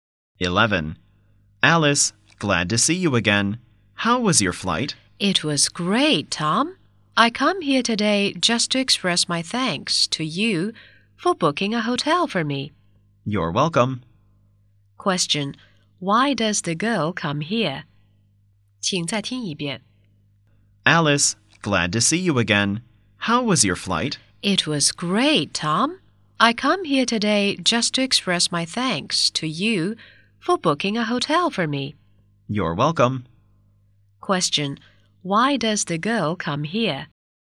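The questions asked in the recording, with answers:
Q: Why does the girl come here?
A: To thank Tom for booking a hotel for her.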